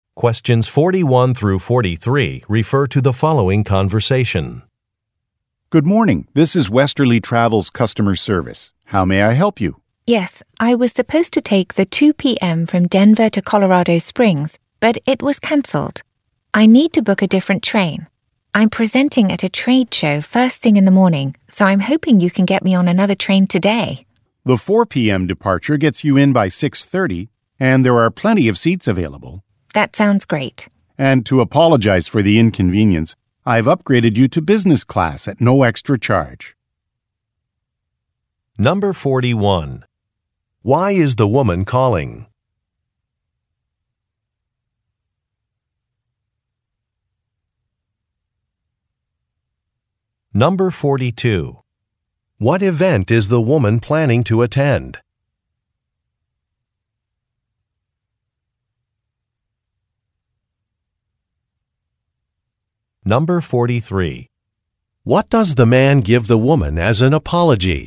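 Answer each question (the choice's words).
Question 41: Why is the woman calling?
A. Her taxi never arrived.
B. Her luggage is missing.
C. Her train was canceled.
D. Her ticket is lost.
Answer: Her train was canceled.

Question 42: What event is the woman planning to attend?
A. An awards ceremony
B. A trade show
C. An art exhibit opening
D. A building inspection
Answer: A trade show

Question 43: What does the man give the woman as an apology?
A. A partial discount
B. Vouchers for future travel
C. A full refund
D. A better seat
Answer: A better seat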